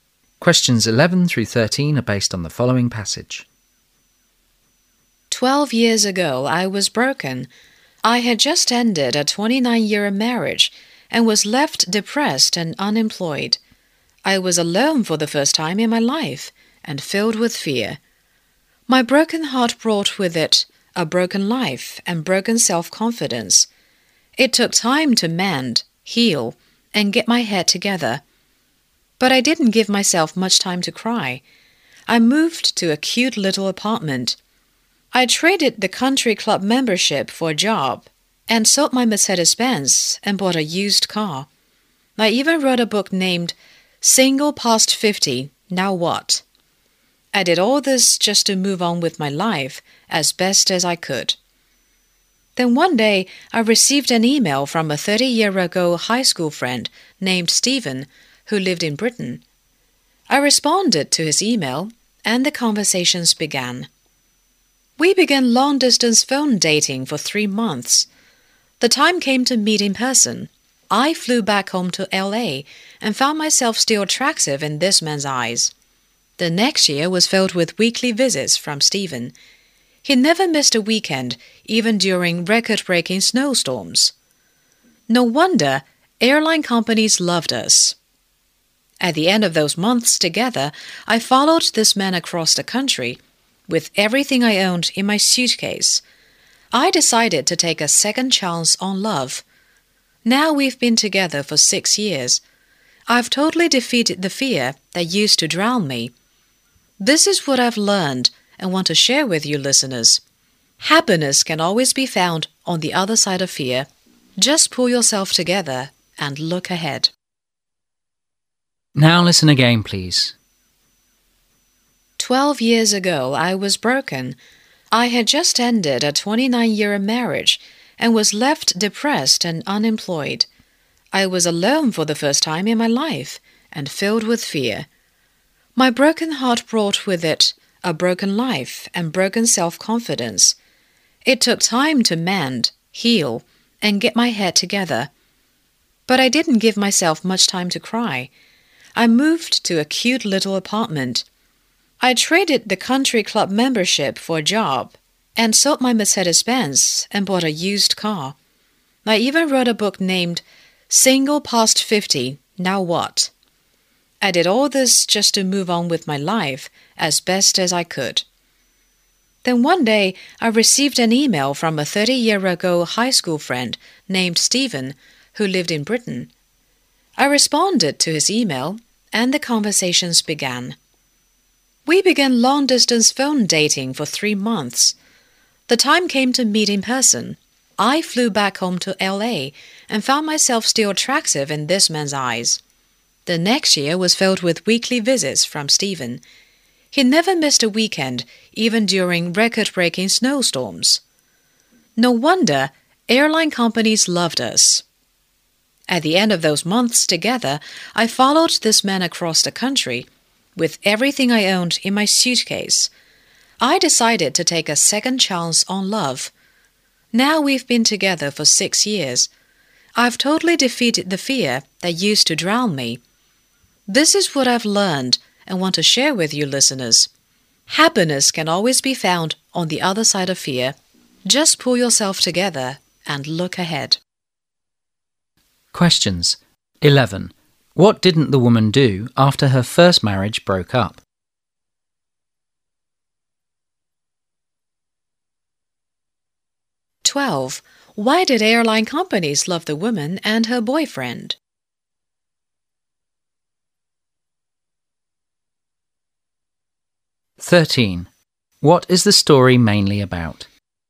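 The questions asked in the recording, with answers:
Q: Why did airline companies love the woman and her boyfriend?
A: Stephen flew to visit her every weekend

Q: What is the story mainly about?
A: Overcoming fear after divorce and finding love and happiness again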